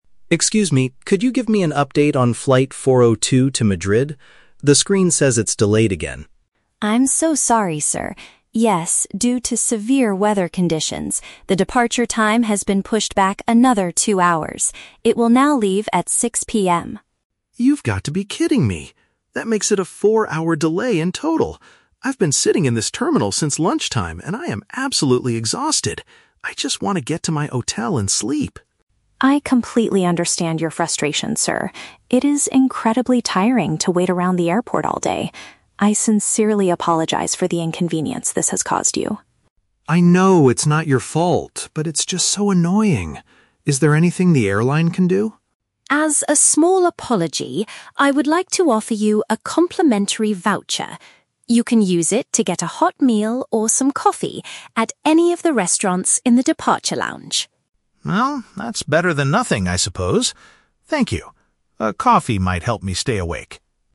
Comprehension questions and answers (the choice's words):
Listen to the conversation between a passenger and an airport ticket agent. Choose the correct answer (A, B, or C) for each question.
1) What is the main reason for the passenger's negative feelings?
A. He is completely exhausted from waiting at the airport all day.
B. He is furious because his flight to Madrid was officially canceled.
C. He is anxious because he cannot find his hotel reservation.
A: He is completely exhausted from waiting at the airport all day.

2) How does the ticket agent react to the passenger's complaints?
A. She blames the severe weather for the passenger's bad attitude.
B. She shows sympathy and understands his tiredness.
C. She gets annoyed because the passenger is shouting at her.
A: She shows sympathy and understands his tiredness.

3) What does the agent offer to make the passenger feel better?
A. A free night at a comfortable hotel in Madrid.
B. A full refund for his delayed flight ticket.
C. A free ticket to buy food and beverages at the airport.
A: A free ticket to buy food and beverages at the airport.

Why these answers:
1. The Key: The passenger says, "I've been sitting in this terminal since lunchtime, and I am absolutely exhausted." Option A is a direct paraphrase of this statement. The Trap (B): Madrid is his destination, but his flight is only "delayed" (pushed back), not canceled. The Trap (C): He mentions he wants to "get to my hotel," but he never says he lost his reservation.
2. The Key: The agent says, "I completely understand your frustration... It is incredibly tiring to wait around." This means she is sympathetic to his situation. The Trap (A): The agent mentions "severe weather conditions" as the reason for the delay, not as an excuse to blame the passenger's attitude. The Plausible (C): It is common for passengers to shout and agents to get annoyed, but in this audio, the passenger says "I know it's not your fault," and the agent remains very polite.
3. The Key: The agent offers a "complimentary voucher" (a free ticket) to get "a hot meal or some coffee" (food and beverages) in the "departure lounge" (at the airport). The Trap (A): The word "hotel" is mentioned by the passenger earlier, but the agent does not offer him a free hotel room. The Plausible (B): A full refund is a common request during a delay, but the airline only offers a meal voucher in this conversation.

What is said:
Passenger: Excuse me, could you give me an update on flight 402 to Madrid? The screen says it's delayed again.
Agent: I'm so sorry, sir. Yes, due to severe weather conditions, the departure time has been pushed back another two hours. It will now leave at 6 PM.
Passenger: You've got to be kidding me! That makes it a four-hour delay in total. I've been sitting in this terminal since lunchtime, and I am absolutely exhausted. I just want to get to my hotel and sleep.
Agent: I completely understand your frustration, sir. It is incredibly tiring to wait around the airport all day. I sincerely apologize for the inconvenience this has caused you.
Passenger: I know it's not your fault, but it's just so annoying. Is there anything the airline can do?
Agent: As a small apology, I would like to offer you a complimentary voucher. You can use it to get a hot meal or some coffee at any of the restaurants in the departure lounge.
Passenger: Well, that's better than nothing, I suppose. Thank you. A coffee might help me stay awake.